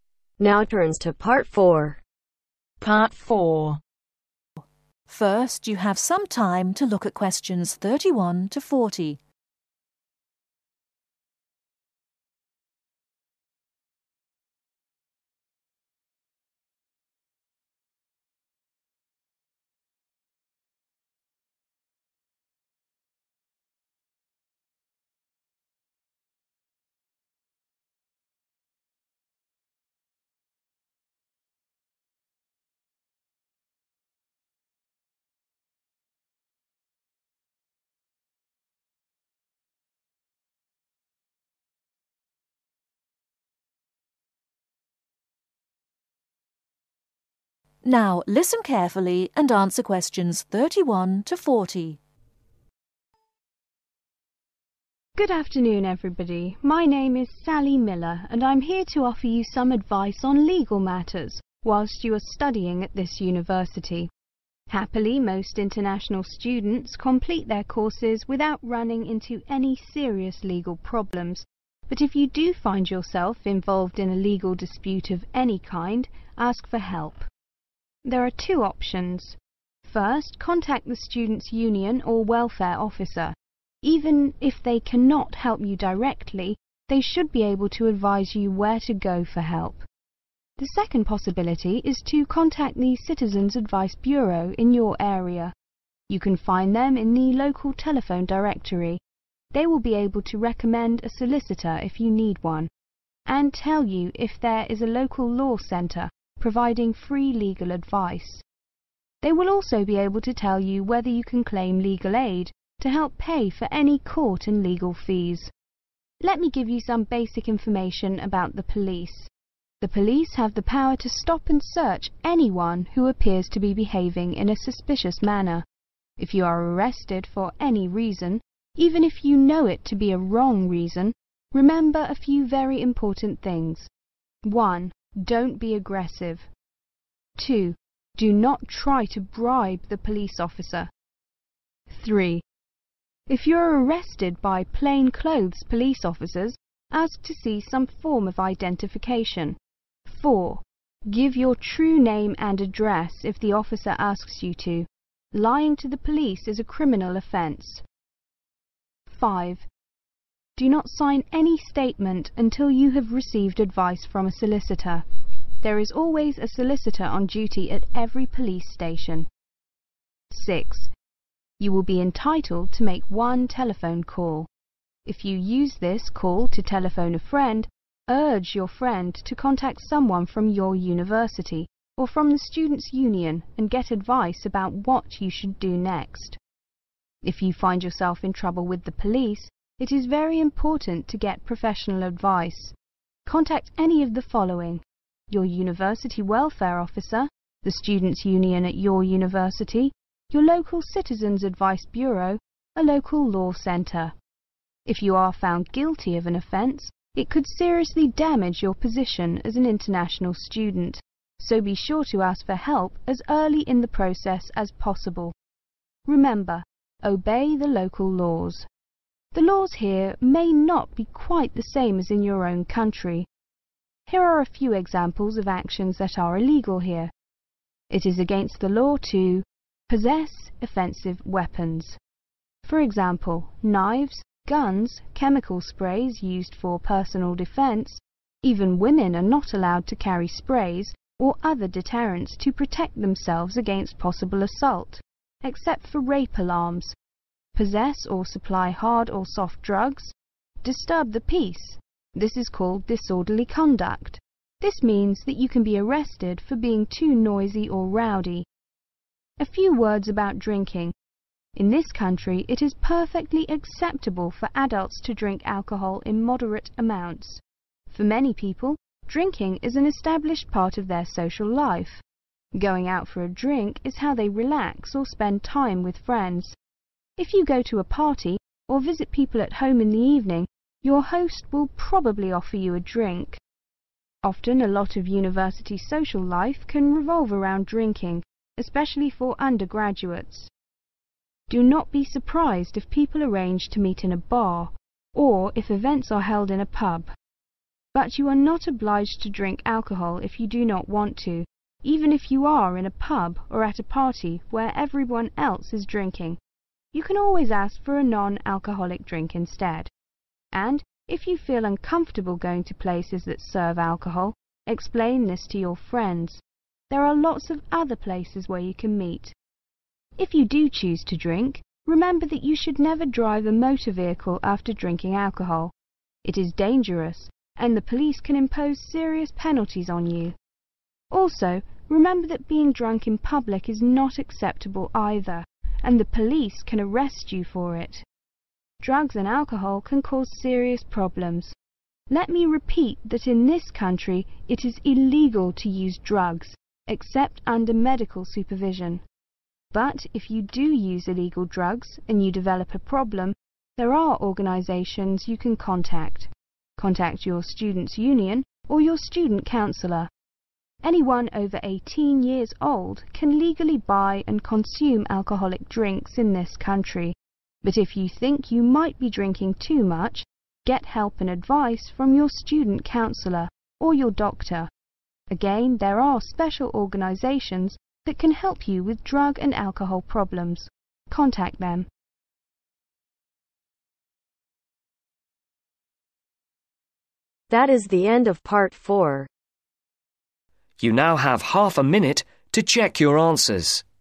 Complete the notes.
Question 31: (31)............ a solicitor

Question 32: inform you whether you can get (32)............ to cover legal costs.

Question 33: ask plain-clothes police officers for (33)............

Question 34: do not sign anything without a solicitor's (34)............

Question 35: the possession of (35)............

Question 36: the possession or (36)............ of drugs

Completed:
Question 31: recommend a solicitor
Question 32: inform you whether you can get legal aid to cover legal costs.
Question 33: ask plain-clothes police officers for form identification
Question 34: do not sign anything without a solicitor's advise/advice
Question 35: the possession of (offensive) weapons
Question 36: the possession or supply (hard) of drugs